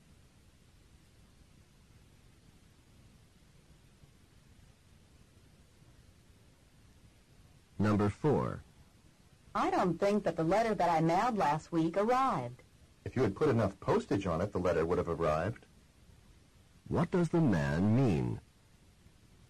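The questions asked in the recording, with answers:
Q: What does the man mean?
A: The woman did not put enough postage on the letter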